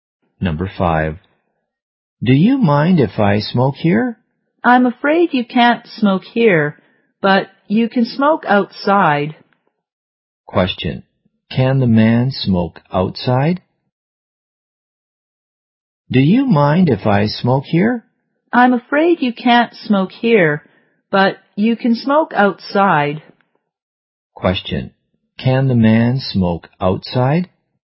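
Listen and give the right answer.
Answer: Yes, he can.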